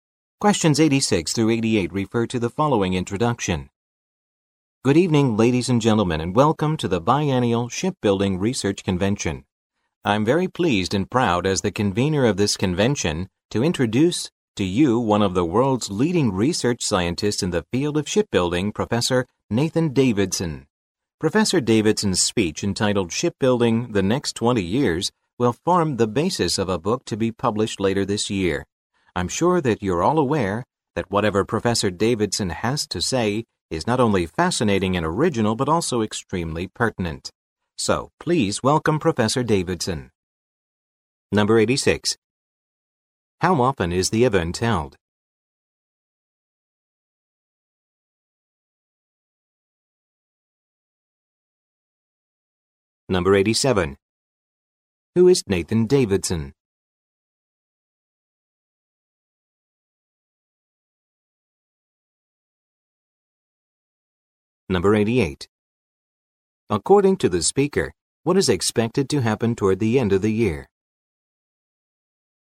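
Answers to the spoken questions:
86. Every two years
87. A shipbuilding research scientist
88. A book based on his speech will be published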